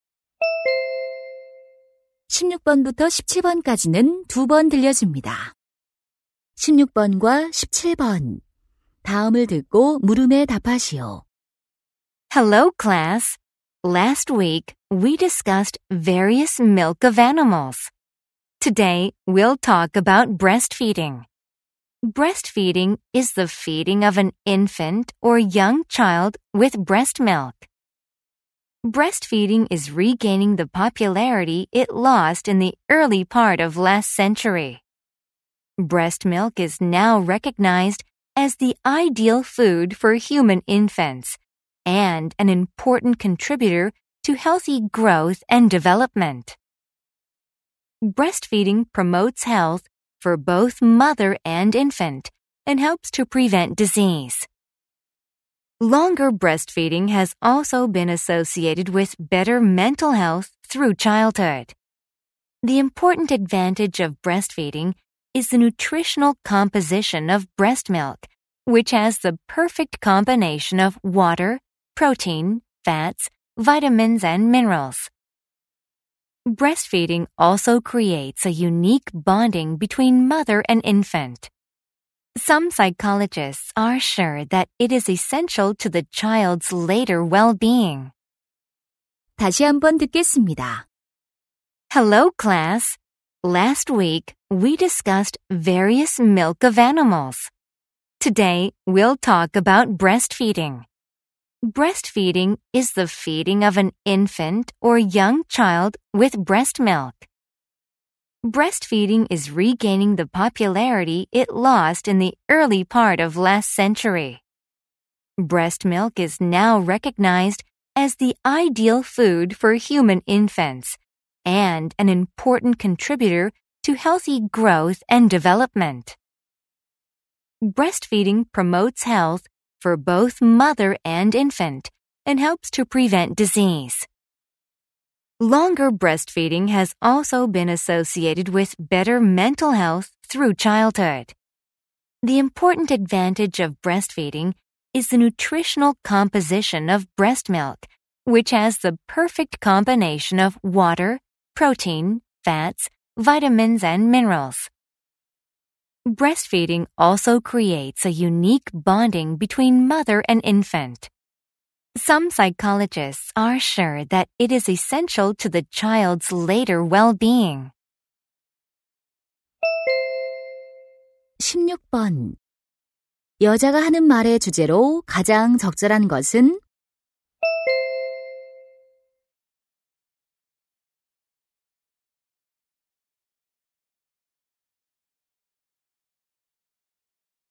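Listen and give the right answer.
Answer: 모유 수유의 장점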